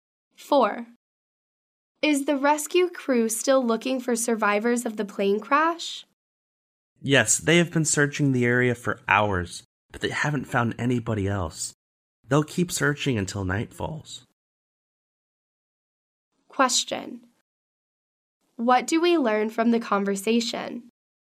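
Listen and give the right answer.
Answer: The rescue crew will keep searching for survivors until nightfall.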